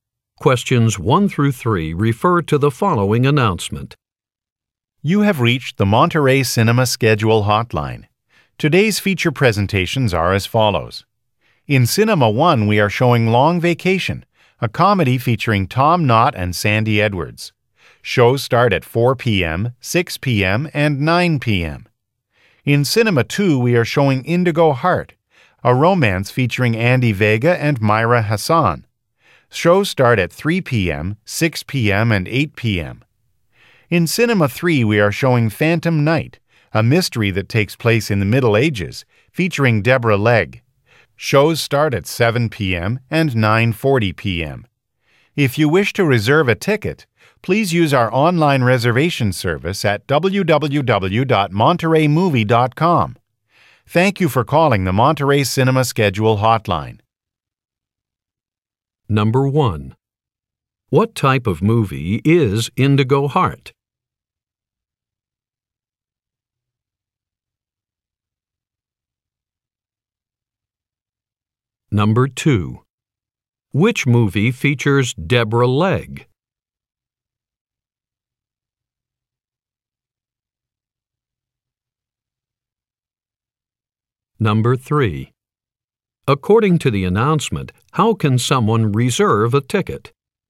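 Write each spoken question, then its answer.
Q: What type of movie is Indigo Heart?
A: A romance

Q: Which movie features Deborah Legg?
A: Phantom Night

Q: According to the announcement, how can someone reserve a ticket?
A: Online, at www.montereymovie.com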